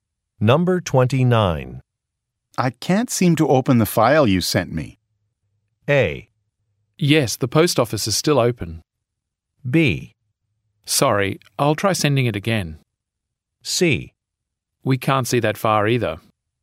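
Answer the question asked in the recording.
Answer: B: Sorry, I'll try sending it again.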